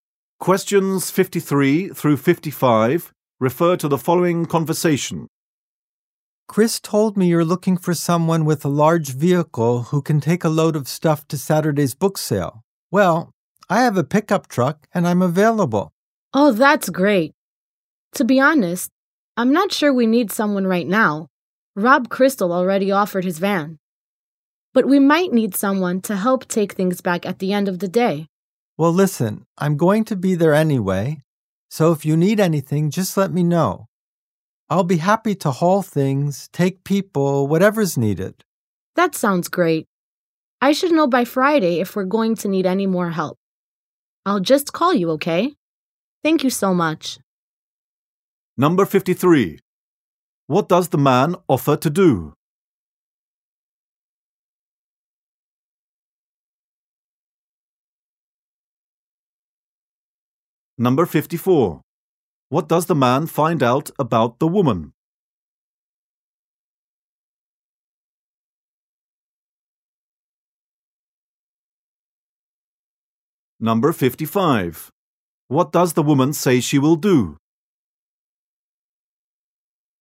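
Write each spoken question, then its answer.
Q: What does the man offer to do?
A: Haul things to the book sale in his pickup truck

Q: What does the woman say she will do?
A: Call him by Friday if more help is needed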